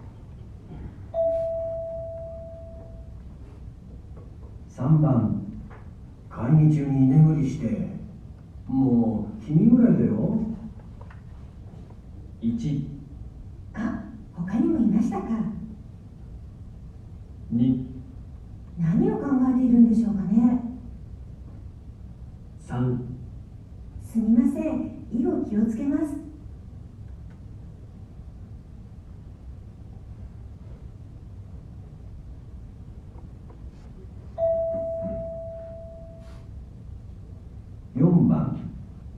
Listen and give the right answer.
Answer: 3

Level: N1 Listening · Test 2